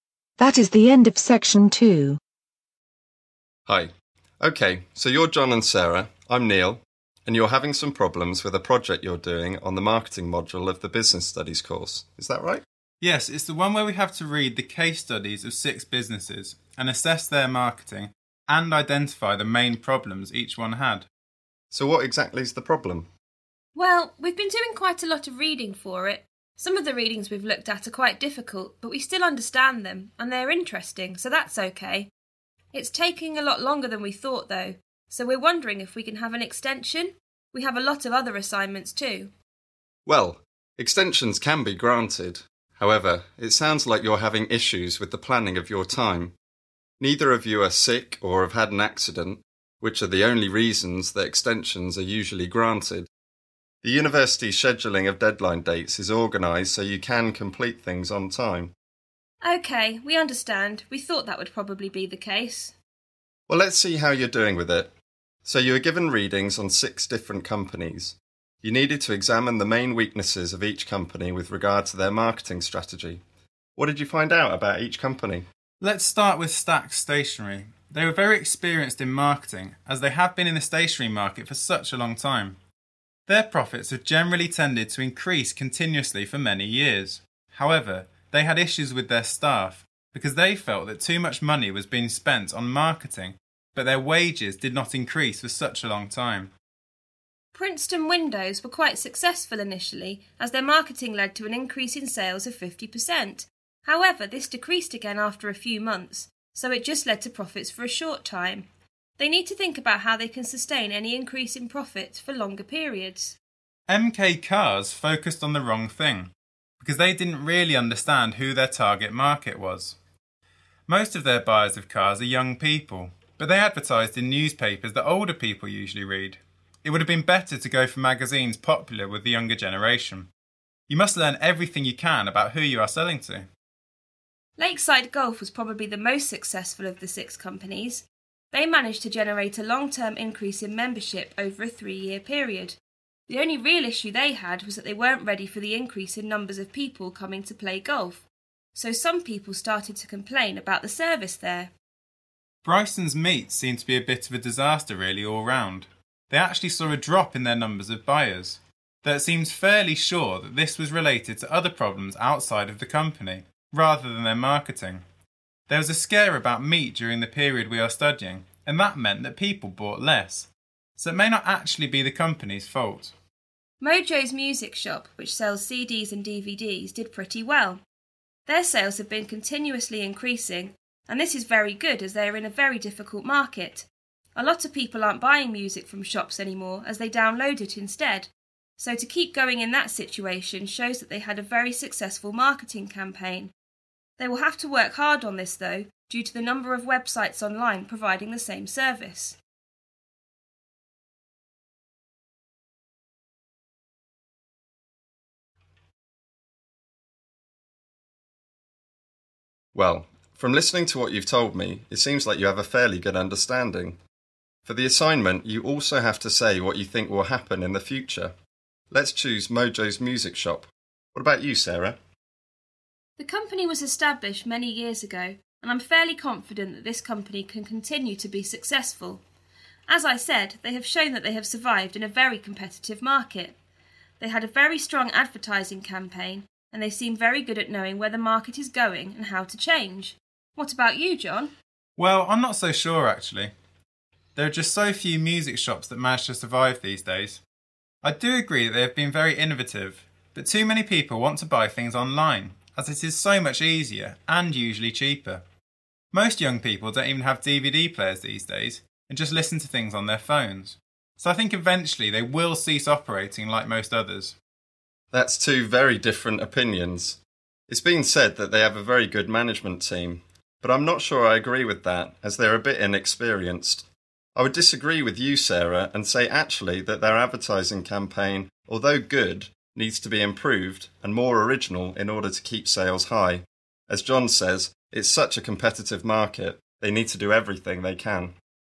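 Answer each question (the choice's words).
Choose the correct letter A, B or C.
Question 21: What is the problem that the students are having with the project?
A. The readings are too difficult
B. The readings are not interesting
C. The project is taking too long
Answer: The project is taking too long

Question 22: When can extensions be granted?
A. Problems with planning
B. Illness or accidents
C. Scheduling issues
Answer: Illness or accidents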